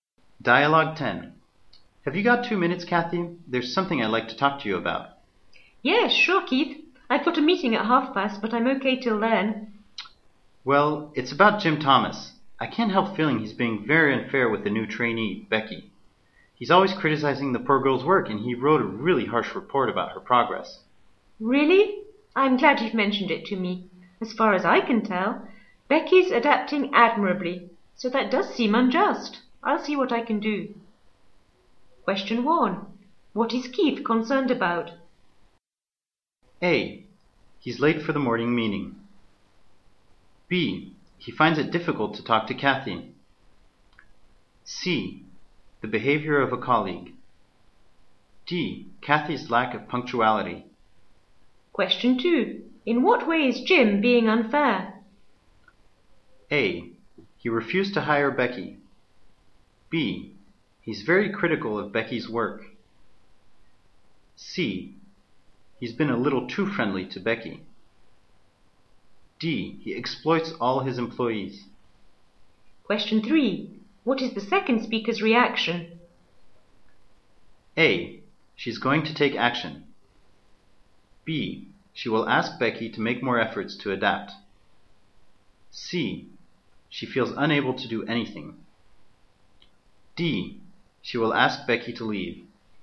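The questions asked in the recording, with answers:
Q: What is Keith concerned about?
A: C: The behavior of a colleague.

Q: In what way is Jim being unfair?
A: B: He's very critical of Becky's work.

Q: What is the second speaker's reaction?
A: A: She's going to take action.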